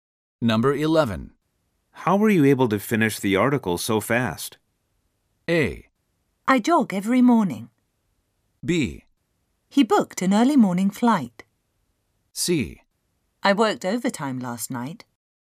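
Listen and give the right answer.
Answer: C: I worked overtime last night.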